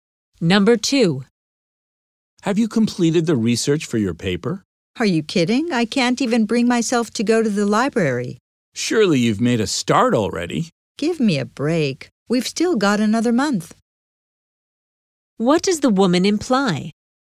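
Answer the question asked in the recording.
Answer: She hasn't started the research yet, as there's still a month left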